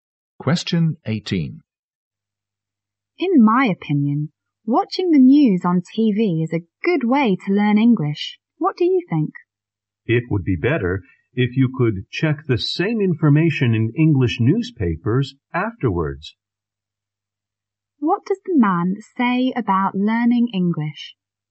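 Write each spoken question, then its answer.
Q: What does the man say about learning English?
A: Watching TV news is better if you also check the same news in English newspapers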